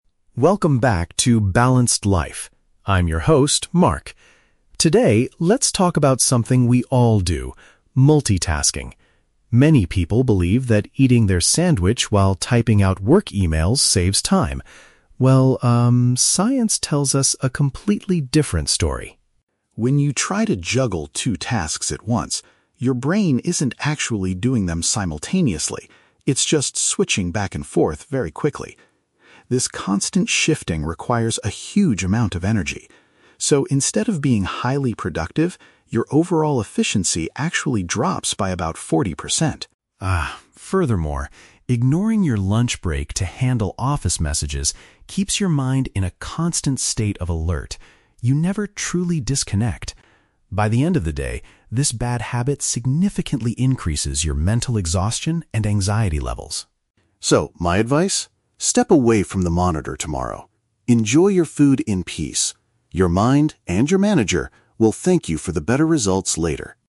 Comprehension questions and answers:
Listen to a podcast host talking about the habit of multitasking and choose the correct answer (A, B, or C).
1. What does the host say about the habit of eating and answering emails at the same time?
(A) It is a proven method to finish office duties much faster.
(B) It causes a significant reduction in a person's work output.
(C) It helps employees impress their managers with better results.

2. According to the host, what happens inside the brain when we try to multitask?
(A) It rapidly moves our attention between different activities.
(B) It performs two complex actions at the exact same moment.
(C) It enters a natural state of deep relaxation and creativity.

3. What is the main reason multitasking leads to higher stress?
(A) Workers consume unhealthy fast food like sandwiches too quickly.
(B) People often forget to reply to important office messages.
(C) The brain does not get a proper chance to rest and switch off.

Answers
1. B
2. A
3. C

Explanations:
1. The host says that when you multitask, your "overall efficiency actually drops." The phrase "reduction in a person's work output" is a paraphrase of efficiency dropping. Trap Analysis: Option (A) is a trap because the host mentions that people believe it saves time, but "science tells us a completely different story." Option (C) is a trap because the host mentions the "manager" at the end, but he says the manager will thank you if you stop multitasking and focus on one thing.
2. The host explains that the brain is "just switching back and forth very quickly." "Rapidly moves our attention" is a direct paraphrase of this action. Trap Analysis: Option (B) is the trap. The script uses the word "simultaneously" (at the exact same moment), but the host says the brain "isn't actually doing them simultaneously" (phủ định). Option (C) is plausible for some activities but is the exact opposite of what happens here.
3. The host says that working through your break keeps your mind "in a constant state of alert" and you "never truly disconnect." This means the brain doesn't get a chance to rest. Trap Analysis: Option (A) is the trap. A "sandwich" is mentioned in the audio as an example of lunch, but the food itself is not the cause of the mental exhaustion and anxiety (stress). Option (B) is a plausible workplace problem but is never mentioned in the podcast.

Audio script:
Host: Welcome back to 'Balanced Life'. I'm your host, Mark. Today, let's talk about something we all do: multitasking. Many people believe that eating their sandwich while typing out work emails saves time. Well, um, science tells us a completely different story.
When you try to juggle two tasks at once, your brain isn't actually doing them simultaneously. It's just switching back and forth very quickly. This constant shifting requires a huge amount of energy. So, instead of being highly productive, your overall efficiency actually drops by about forty percent.
Ah, furthermore, ignoring your lunch break to handle office messages keeps your mind in a constant state of alert. You never truly disconnect. By the end of the day, this bad habit significantly increases your mental exhaustion and anxiety levels.
So, my advice? Step away from the monitor tomorrow. Enjoy your food in peace. Your mind—and your manager—will thank you for the better results later.

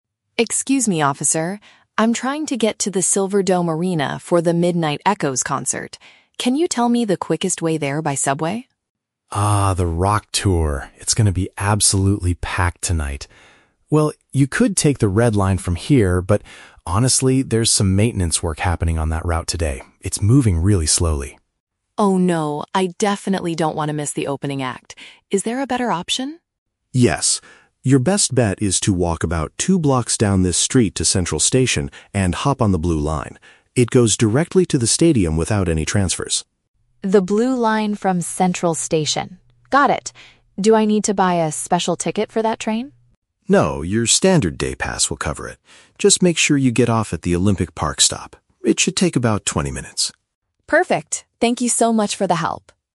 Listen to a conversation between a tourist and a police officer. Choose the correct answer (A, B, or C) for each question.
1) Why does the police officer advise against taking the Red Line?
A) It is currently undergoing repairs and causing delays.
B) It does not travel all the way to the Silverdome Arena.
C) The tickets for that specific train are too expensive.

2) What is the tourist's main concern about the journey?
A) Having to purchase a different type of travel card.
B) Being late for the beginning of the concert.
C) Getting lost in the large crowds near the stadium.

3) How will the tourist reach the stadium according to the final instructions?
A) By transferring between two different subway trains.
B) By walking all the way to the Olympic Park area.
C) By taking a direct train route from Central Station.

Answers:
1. A
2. B
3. C

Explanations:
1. The officer says there is "maintenance work happening" and the train is "moving really slowly" (which paraphrases to undergoing repairs and causing delays). Why the traps are wrong: (B) is a trap. The officer initially says "you could take the Red Line from here" to get to the arena, meaning it does go there, but rejects it because it is slow. (C) is a plausible reason, but the cost of the Red Line is never mentioned.
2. The tourist says, "I definitely don't want to miss the opening act" (which means being late for the beginning of the concert). Why the traps are wrong: (A) is a trap. The tourist asks about a "special ticket" (travel card), but the officer assures him his current pass works, so it is not his main concern for changing the route. (C) is plausible because the officer mentions the event will be "packed", but the tourist does not express fear of getting lost in the crowd.
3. The officer tells the tourist to go to Central Station and take the Blue Line because "It goes directly to the stadium" (which paraphrases to taking a direct train route). Why the traps are wrong: (A) is a trap. The officer explicitly states the Blue Line goes there "without any transfers." (B) is a trap. The tourist only has to walk "two blocks" to the station, not all the way to the park/stadium.

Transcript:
Tourist: Excuse me, officer. I'm trying to get to the Silverdome Arena for The Midnight Echoes concert. Can you tell me the quickest way there by subway?
Officer: Ah, the rock tour. It's going to be absolutely packed tonight. Well, you could take the Red Line from here, but honestly, there's some maintenance work happening on that route today. It's moving really slowly.
Tourist: Oh, no. I definitely don't want to miss the opening act. Is there a better option?
Officer: Yes. Your best bet is to walk about two blocks down this street to Central Station and hop on the Blue Line. It goes directly to the stadium without any transfers.
Tourist: The Blue Line from Central Station. Got it. Do I need to buy a special ticket for that train?
Officer: No, your standard day pass will cover it. Just make sure you get off at the Olympic Park stop. It should take about twenty minutes.

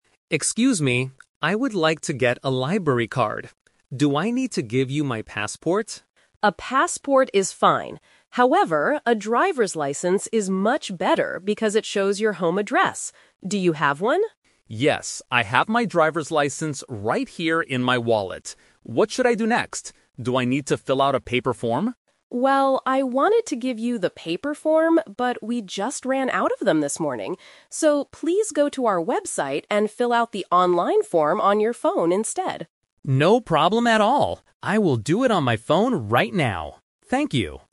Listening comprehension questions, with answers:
Listen to a conversation between a man and a librarian. Choose the correct answer A, B, or C.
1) What document will the man use to get his library card?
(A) His passport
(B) His student ID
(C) His driver's license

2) Why doesn't the librarian give the man a paper form?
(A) Because they don't have any paper forms left.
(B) Because she wants to save paper.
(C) Because the man prefers using his phone.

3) How will the man fill out the form?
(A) On a piece of paper.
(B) On his mobile phone.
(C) On the library's computer.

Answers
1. C
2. A
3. B

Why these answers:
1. The librarian says a driver's license is better, and Tom says "I have my driver's license right here."
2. The librarian says, "we just ran out of them this morning." This means they have no paper forms left.
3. The librarian tells him to "fill out the online form on your phone instead," and Tom agrees to do it.

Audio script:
Tom: Excuse me. I would like to get a library card. Do I need to give you my passport?
Clark: A passport is fine. However, a driver's license is much better because it shows your home address. Do you have one?
Tom: Yes, I have my driver's license right here in my wallet. What should I do next? Do I need to fill out a paper form?
Clark: Well, I wanted to give you the paper form, but we just ran out of them this morning. So, please go to our website and fill out the online form on your phone instead.

